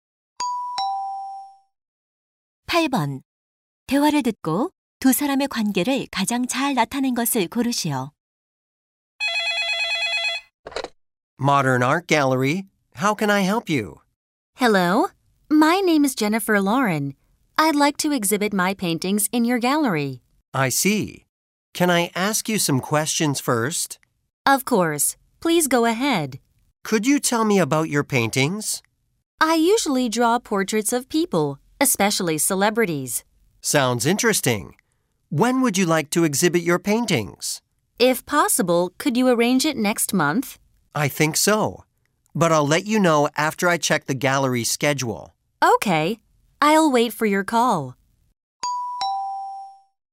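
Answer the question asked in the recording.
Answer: 미술관 직원 - 화가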